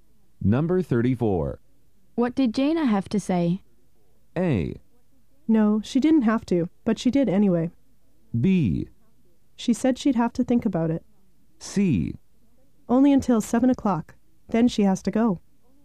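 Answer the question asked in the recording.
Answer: B: She said she'd have to think about it.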